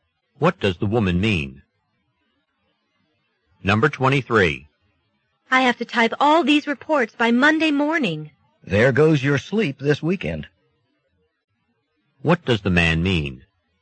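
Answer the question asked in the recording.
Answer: The woman won't get much sleep this weekend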